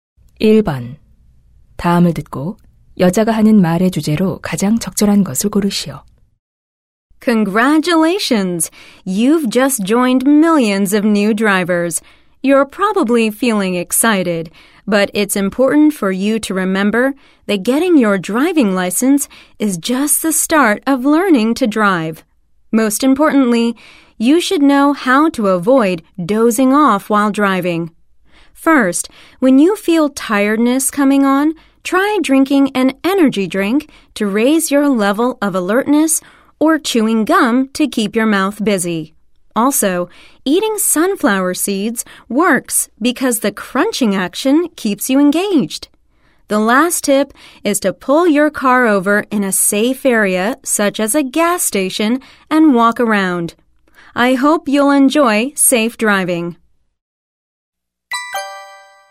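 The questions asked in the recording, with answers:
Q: 다음을 듣고 여자가 하는 말의 주제로 가장 적절한 것을 고르시오.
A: 운전 중 졸음을 피하는 방법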